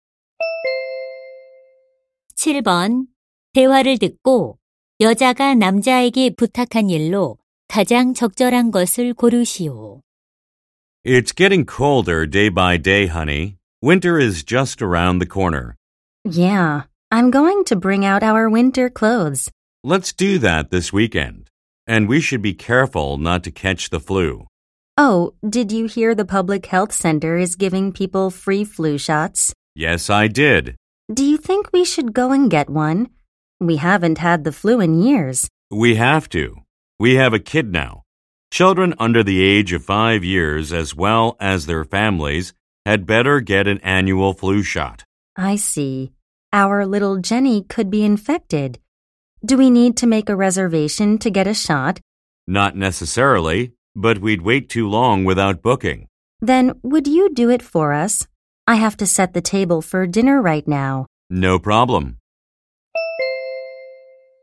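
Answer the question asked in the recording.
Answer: 독감 예방 접종 예약하기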